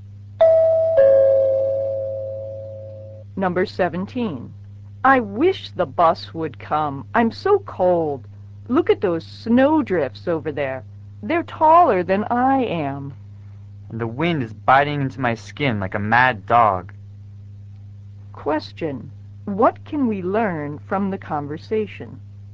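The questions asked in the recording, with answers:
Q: What can we learn from the conversation?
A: It is very cold and snowy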